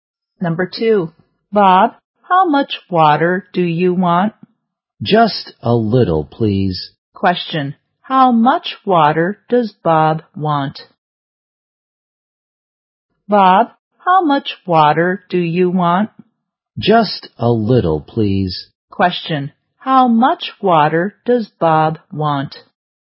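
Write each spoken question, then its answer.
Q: How much water does Bob want?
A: Just a little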